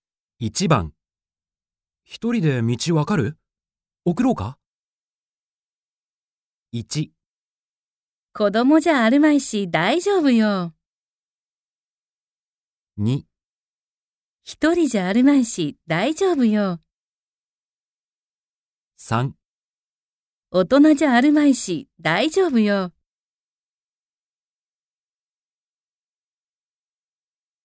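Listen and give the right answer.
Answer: 1: 子供じゃあるまいし大丈夫よ。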